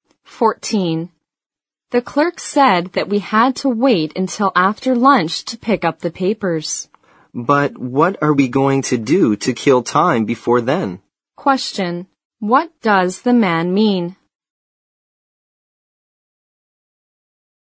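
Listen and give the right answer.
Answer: He wonders what they can do to pass the time until after lunch.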